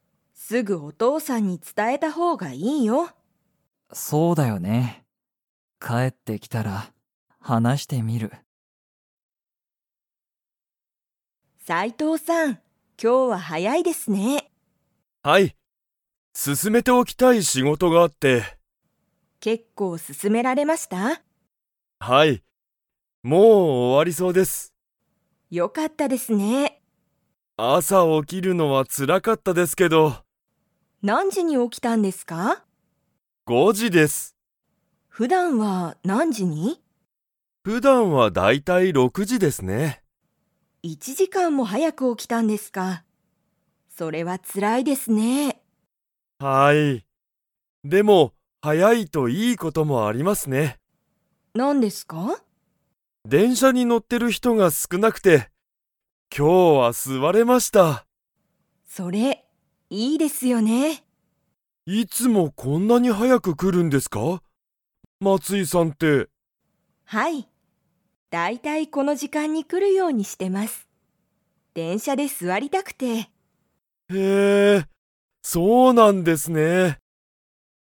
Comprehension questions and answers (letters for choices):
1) 斉藤(さいとう)さんは、今日(きょう)何時(なんじ)に起(お)きましたか?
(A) 5ご時(じ)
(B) 6ろく時(じ)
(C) 7しち時(じ)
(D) 8はち時(じ)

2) 松井(まつい)さんは、いつも会社(かいしゃ)に早(はや)く 。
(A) 来(く)る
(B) 来(こ)ない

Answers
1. A
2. A

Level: Level 3